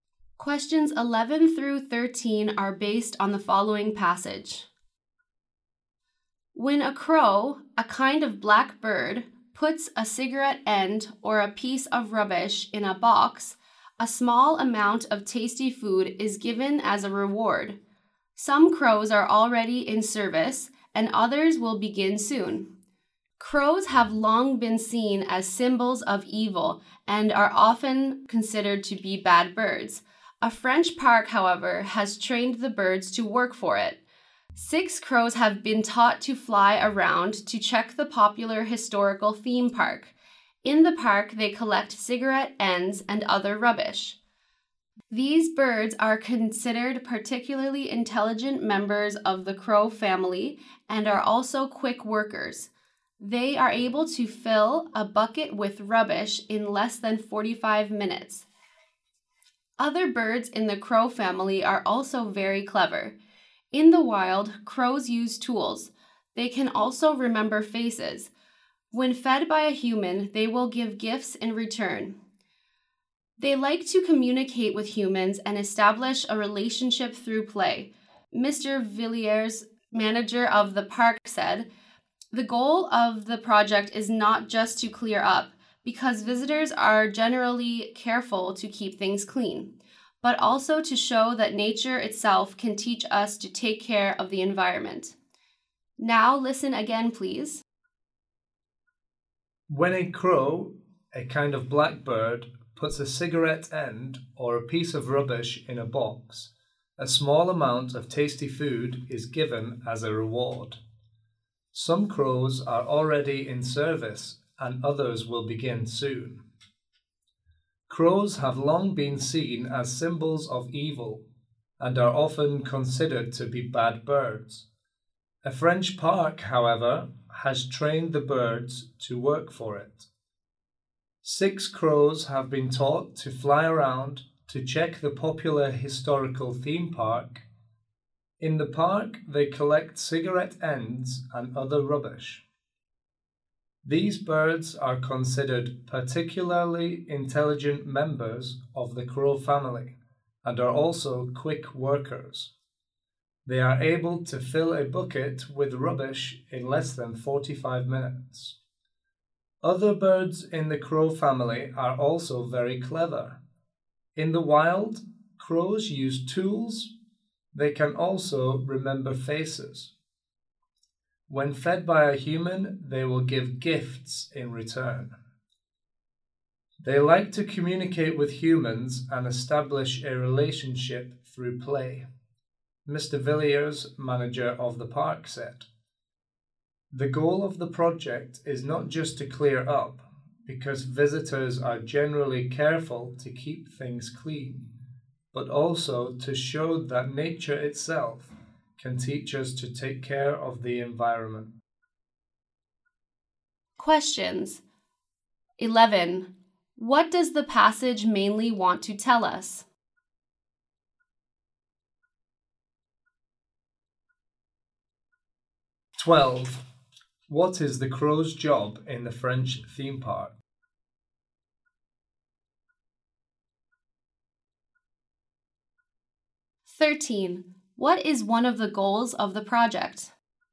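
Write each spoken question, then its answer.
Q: What does the passage mainly want to tell us?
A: A French park has trained crows to collect rubbish

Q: What is the crow's job in the French theme park?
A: Collecting cigarette ends and other rubbish

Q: What is one of the goals of the project?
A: To show that nature can teach us to take care of the environment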